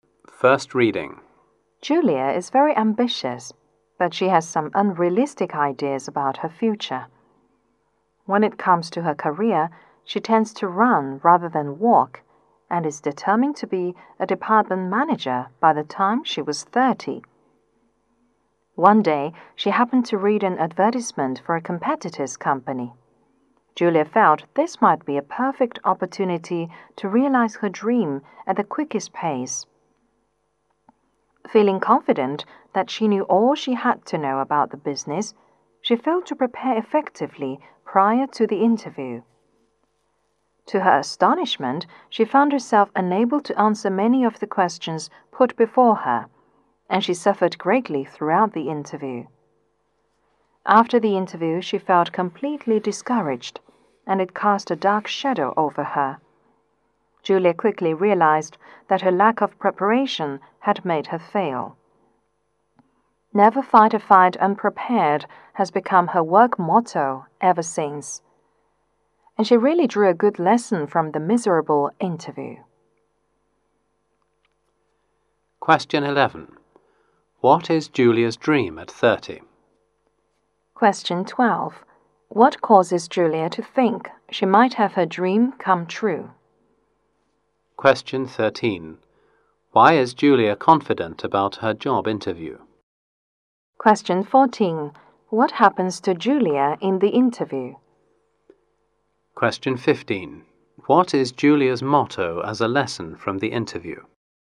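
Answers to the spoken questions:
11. To be a department manager
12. An advertisement for a competitor's company
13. She felt she knew all about the business
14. She couldn't answer many questions
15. Never fight a fight unprepared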